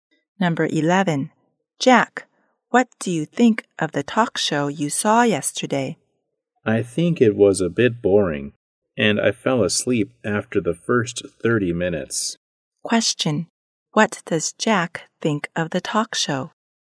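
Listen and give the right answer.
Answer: A bit boring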